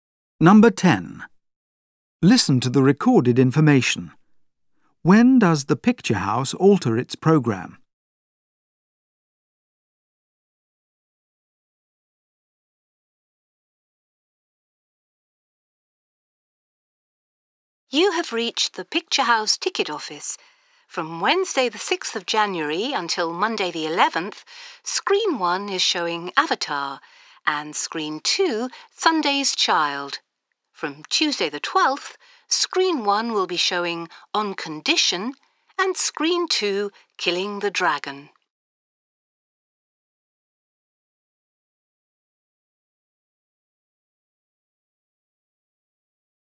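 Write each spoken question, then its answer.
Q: When does the picture house alter its programme?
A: On Tuesday the 12th of January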